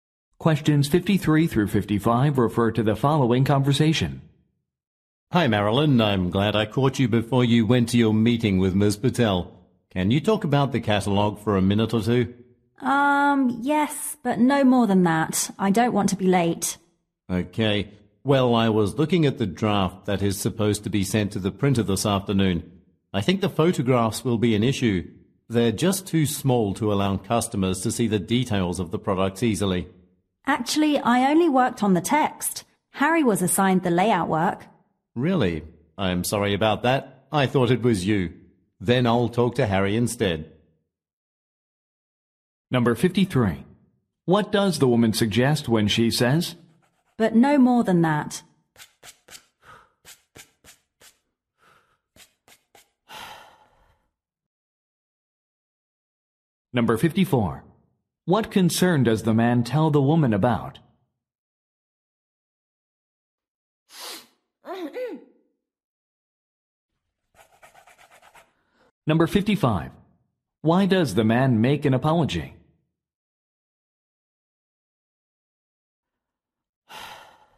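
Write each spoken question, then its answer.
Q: But no more than that.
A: She has limited time

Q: What concern does the man tell the woman about?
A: The catalog photos are too small

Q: Why does the man make an apology?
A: He thought she did the layout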